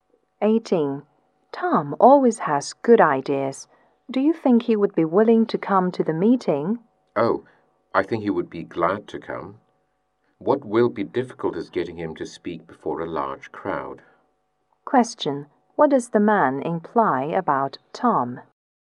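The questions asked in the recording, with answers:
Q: What does the man imply about Tom?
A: Tom is unwilling to speak in front of a large crowd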